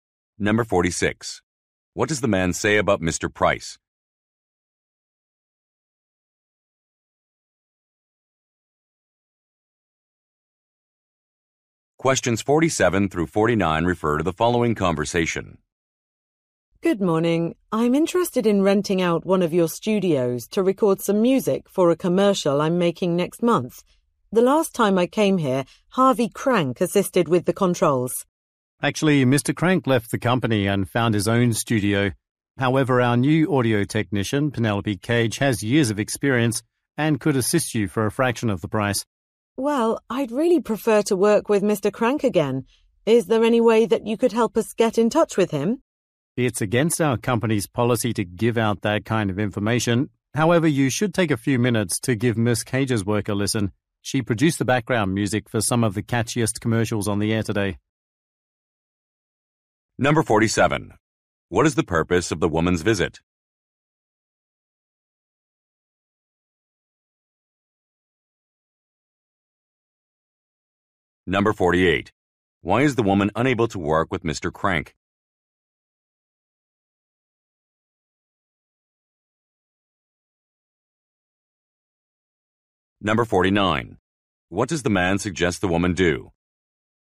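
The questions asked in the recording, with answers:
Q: What is the purpose of the woman's visit?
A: To rent a studio to record music for a commercial

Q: Why is the woman unable to work with Mr.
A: He left the company

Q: What does the man suggest the woman do?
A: Listen to Miss Cage's work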